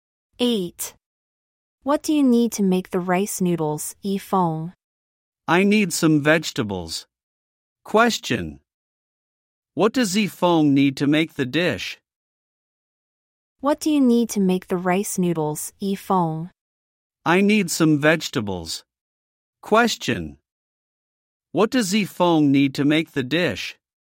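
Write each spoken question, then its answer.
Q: What does Yifeng need to make the dish?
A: Some vegetables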